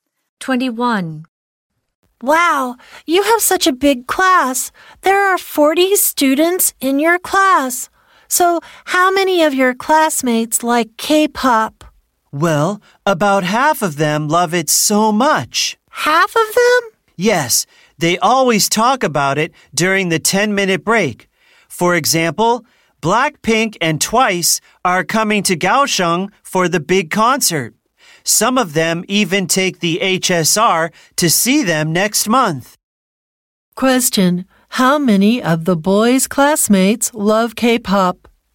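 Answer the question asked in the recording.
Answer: About half of them (about 20)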